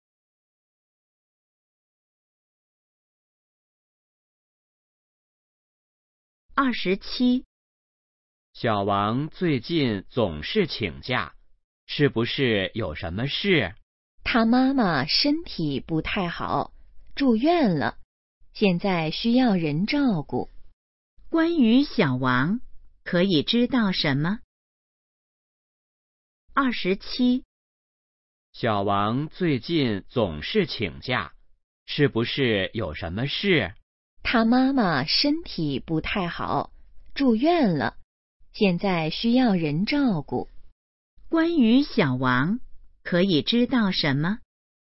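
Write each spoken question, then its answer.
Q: 关于小王,可以知道什么?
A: 他妈妈住院了,他需要照顾她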